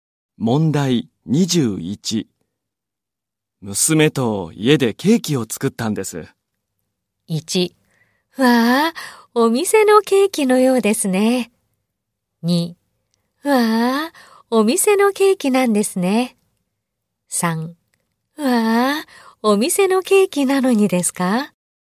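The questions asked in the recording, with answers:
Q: 娘と家でケーキを作ったんです。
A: 1: わあ、お店のケーキのようですね。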